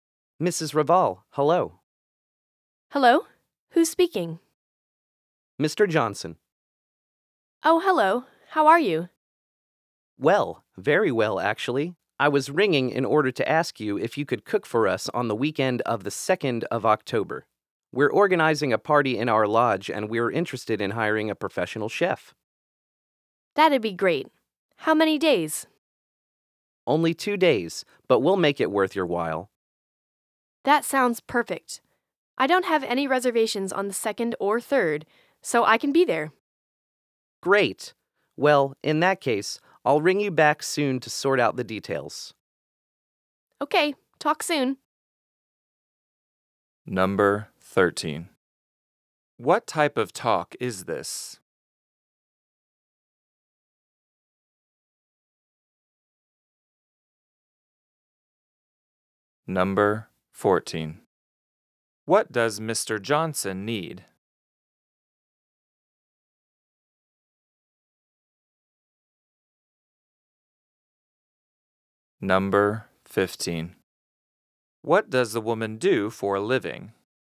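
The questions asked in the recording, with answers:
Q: What type of talk is this?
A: A telephone call

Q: What does Mr. Johnson need?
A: A professional chef to cook for his party

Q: What does the woman do for a living?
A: She is a chef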